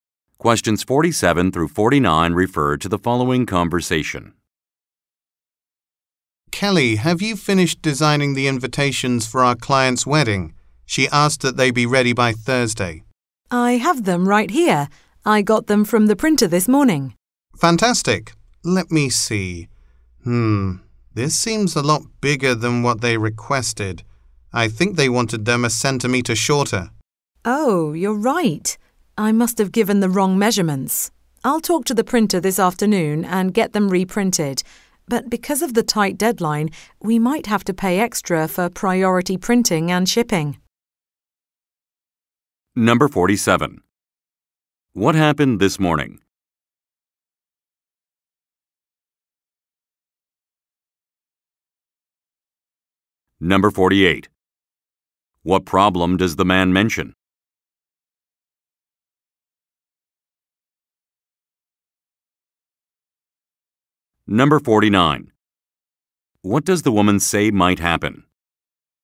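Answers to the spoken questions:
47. The invitations were picked up from the printer.
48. The invitations are too big.
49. They might have to pay extra for priority printing and shipping.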